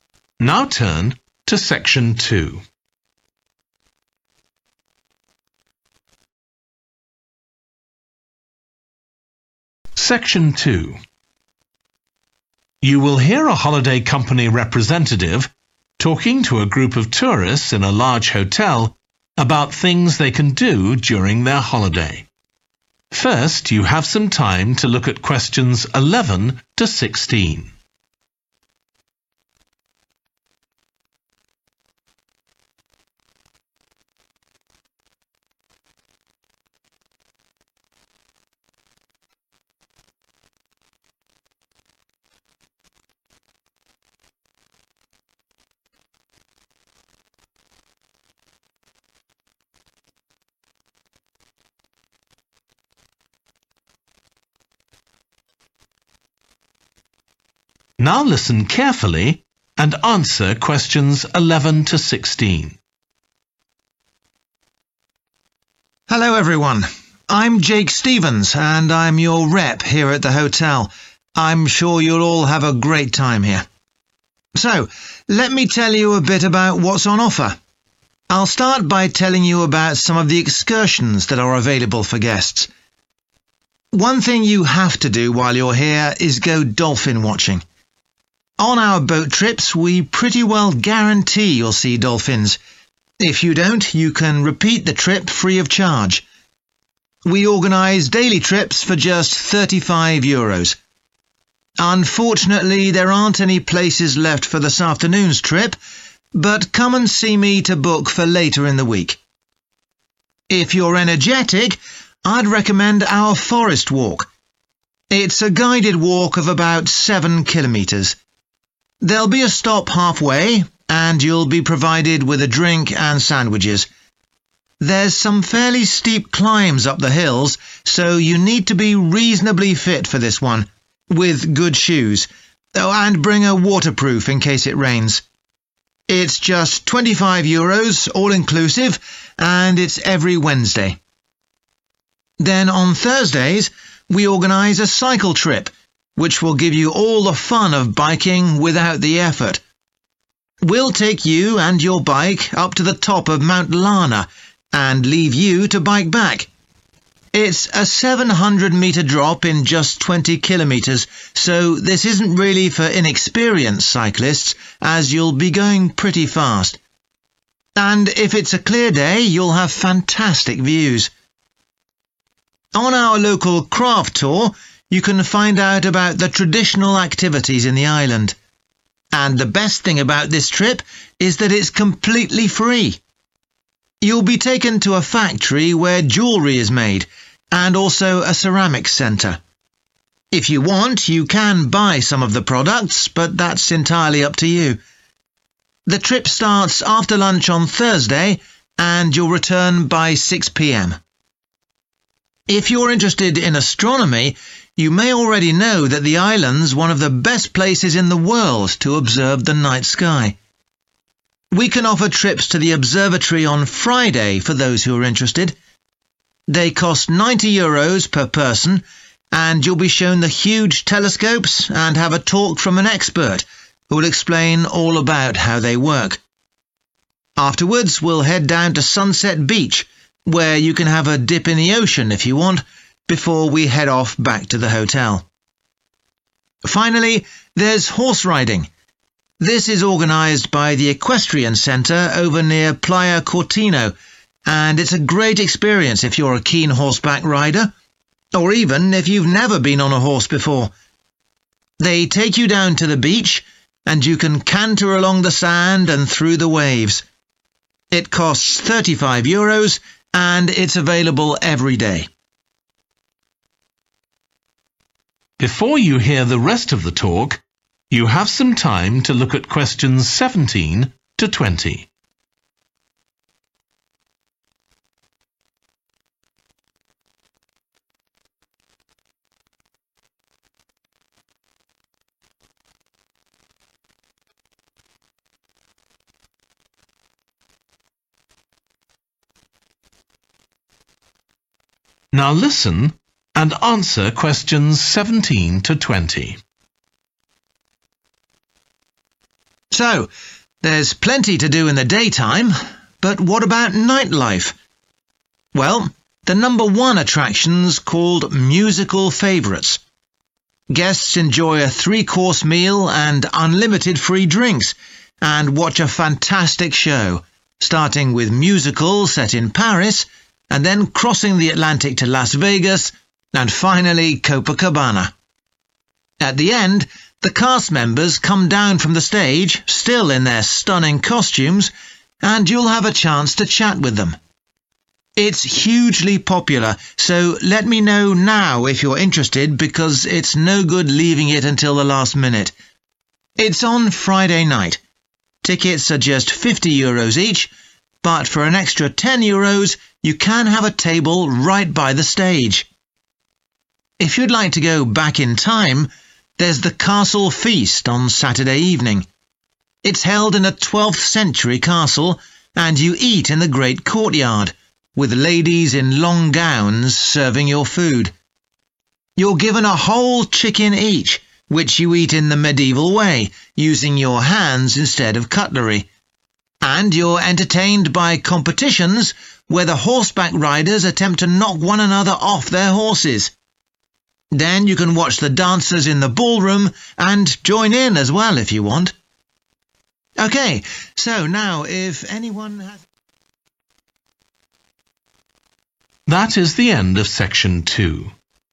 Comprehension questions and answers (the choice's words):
What information does the speaker give about each of the following excursions? Choose SIX answers from the box and write the correct letter, A-H, next to Questions 11-16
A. all downhill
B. suitable for beginners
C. only in good weather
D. food included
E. no charge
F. swimming possible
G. fully booked today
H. transport not include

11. dolphin watching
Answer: fully booked today

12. forest walk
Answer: food included

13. cycle trip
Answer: all downhill

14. local craft tour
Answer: no charge

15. observatory trip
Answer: swimming possible

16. horse riding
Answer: suitable for beginners